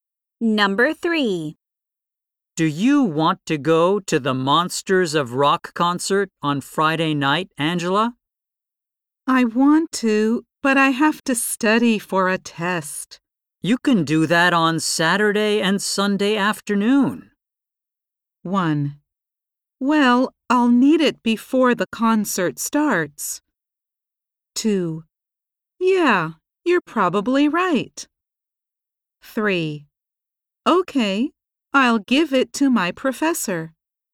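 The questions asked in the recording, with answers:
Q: You can do that on Saturday and Sunday afternoon.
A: 2: Yeah, you're probably right.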